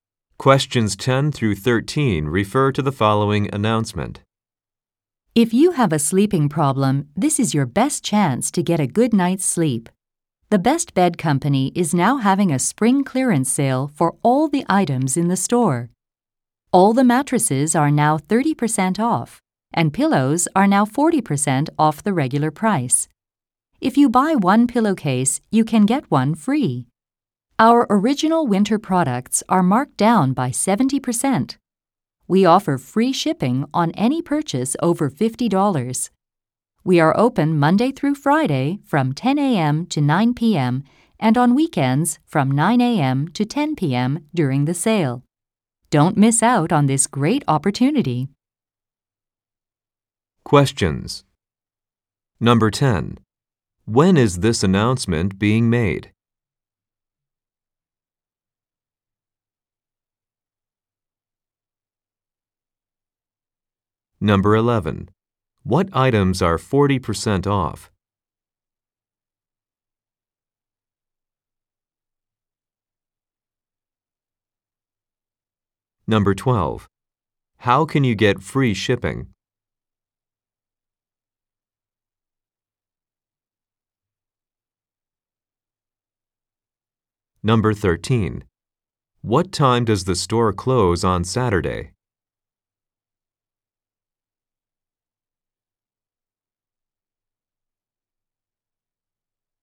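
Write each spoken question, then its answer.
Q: When is this announcement being made?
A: In spring (during a spring clearance sale)

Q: What items are 40% off?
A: Pillows

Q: How can you get free shipping?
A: By spending over $50

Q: What time does the store close on Saturday?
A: 10 p.m.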